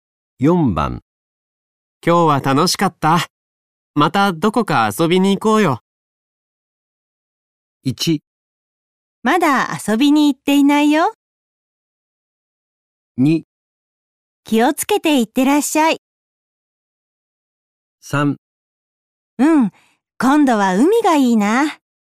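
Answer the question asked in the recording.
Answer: 3: うん、今度は海がいいな。

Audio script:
1
まだ遊びに行っていないよ。
2
気をつけていってらっしゃい。
3
うん、今度は海がいいな。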